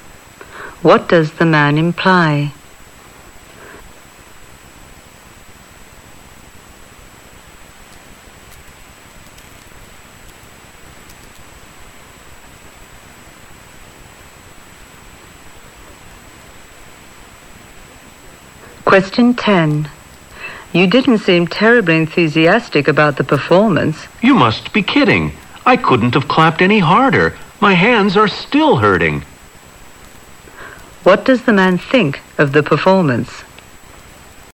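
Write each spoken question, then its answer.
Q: What does the man think of the performance?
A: He liked it very much.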